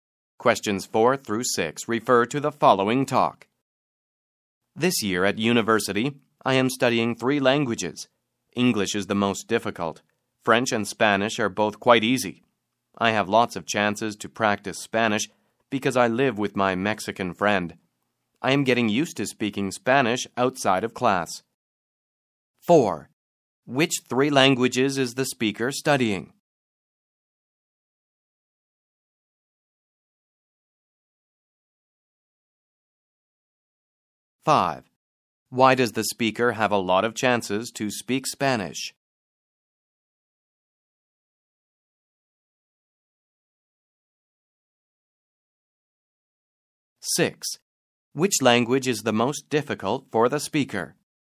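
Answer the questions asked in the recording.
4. English, French and Spanish
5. The speaker lives with a Mexican friend
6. English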